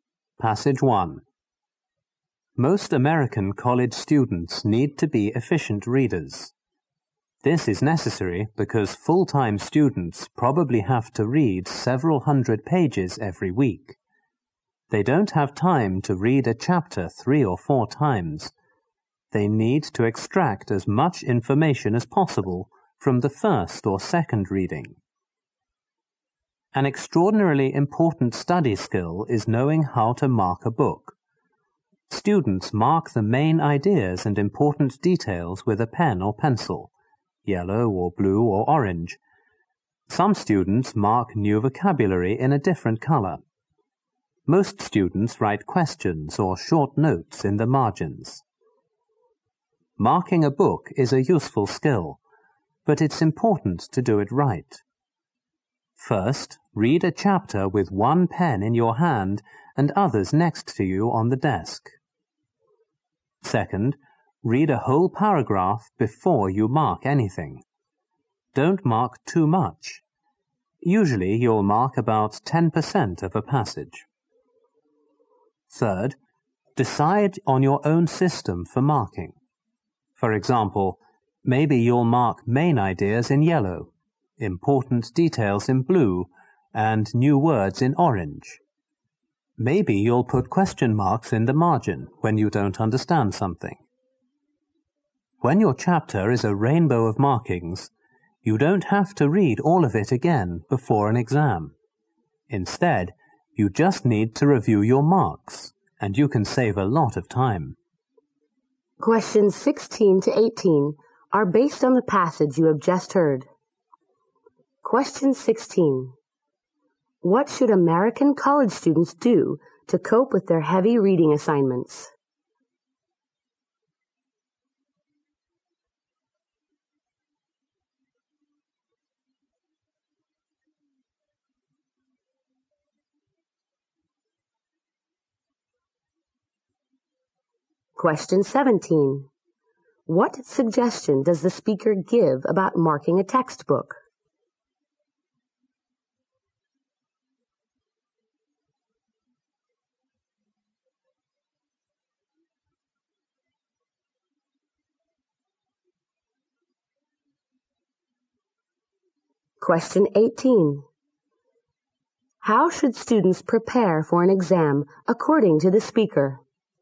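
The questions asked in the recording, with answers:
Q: What should American college students do to cope with their heavy reading assignments?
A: Read efficiently.

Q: How should students prepare for an exam according to the speaker?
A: Review their markings.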